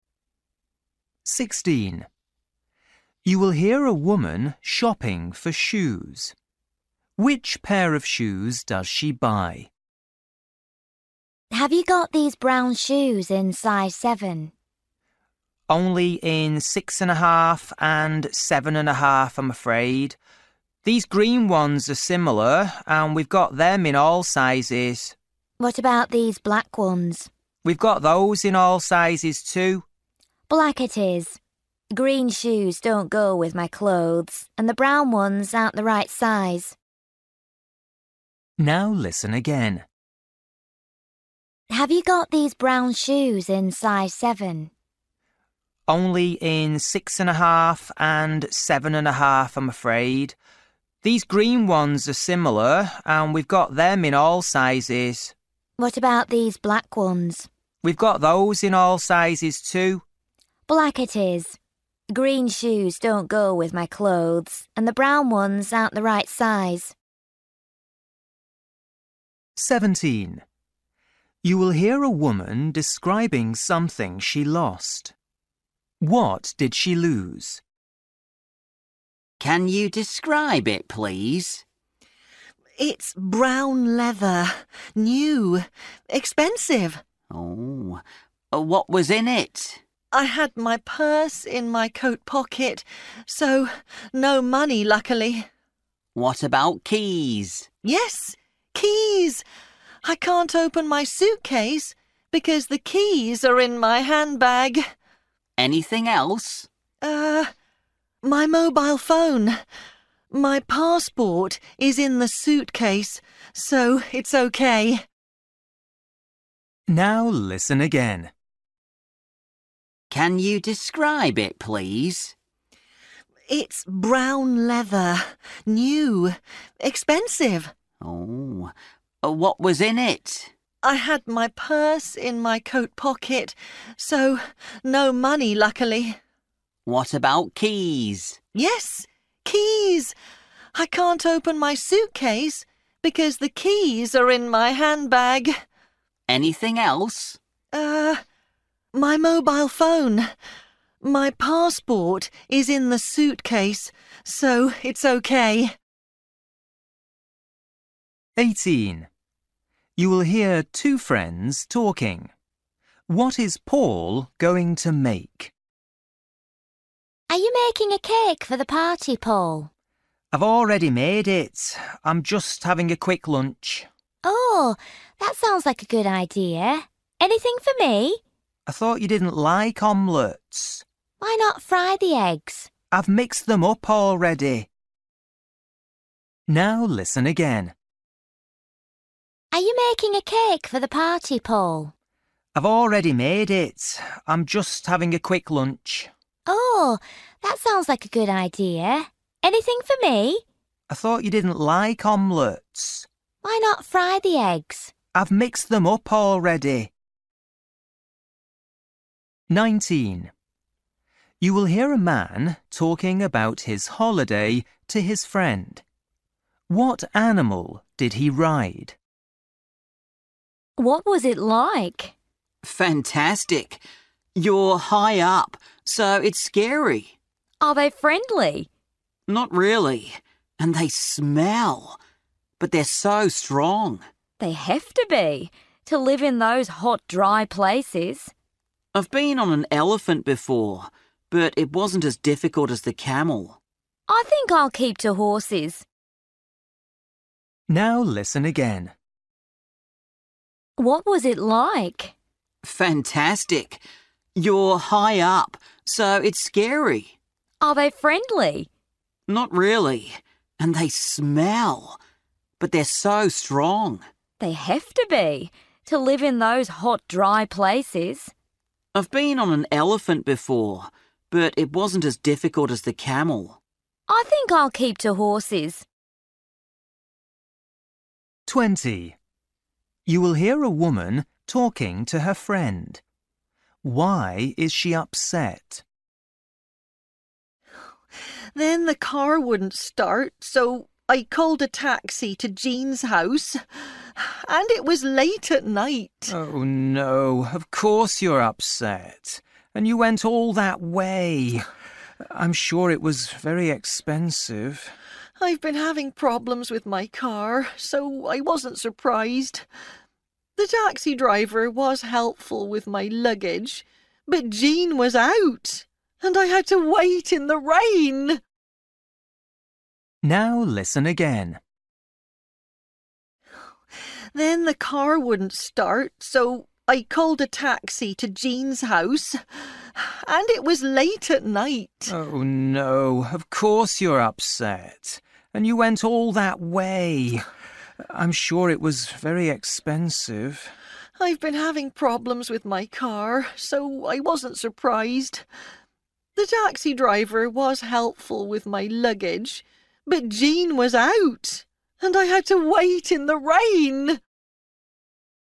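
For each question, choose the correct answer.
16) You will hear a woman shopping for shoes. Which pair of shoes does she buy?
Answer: The black ones

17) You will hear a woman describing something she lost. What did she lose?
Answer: Her handbag

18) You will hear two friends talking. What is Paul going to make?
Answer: An omelette

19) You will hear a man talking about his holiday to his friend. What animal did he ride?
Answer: A camel

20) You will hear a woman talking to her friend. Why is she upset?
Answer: Her friend Jean was out, so she had to wait in the rain

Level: Luyện nghe trình độ A2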